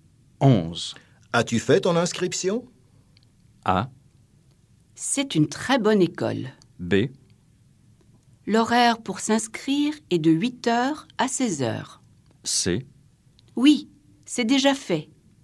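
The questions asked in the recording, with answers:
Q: As-tu fait ton inscription?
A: C: Oui, c'est déjà fait.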